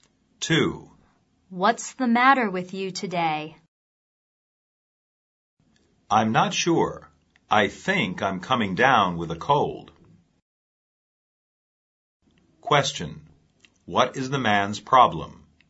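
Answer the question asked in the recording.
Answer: He thinks he is catching a cold.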